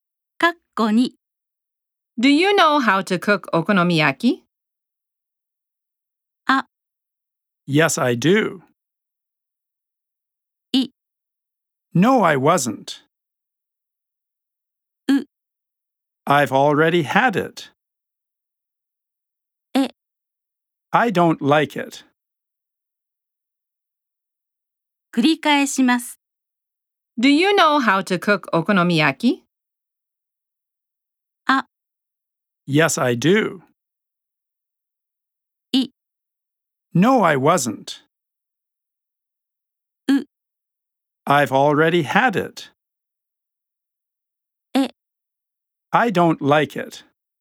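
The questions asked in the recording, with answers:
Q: Do you know how to cook okonomiyaki?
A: あ: Yes, I do.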